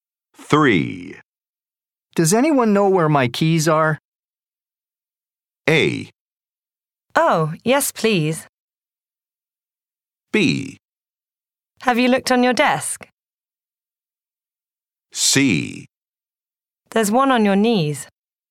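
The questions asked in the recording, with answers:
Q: Does anyone know where my keys are?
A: B: Have you looked on your desk?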